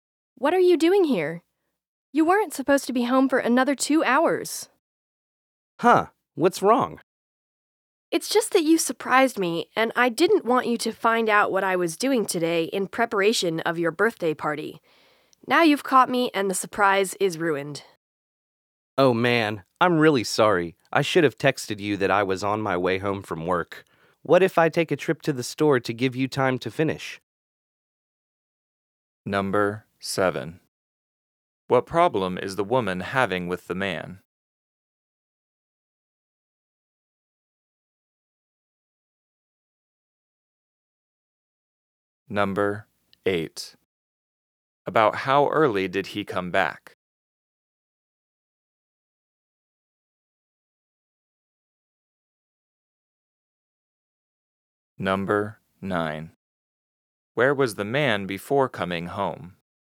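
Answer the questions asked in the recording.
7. He came home early and ruined the surprise she was preparing for his birthday party.
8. About 2 hours early
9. At work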